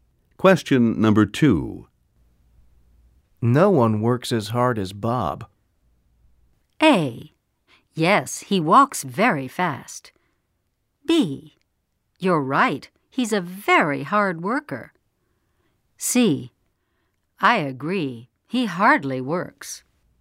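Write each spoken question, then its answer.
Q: No one works as hard as Bob.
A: B: You're right, he's a very hard worker.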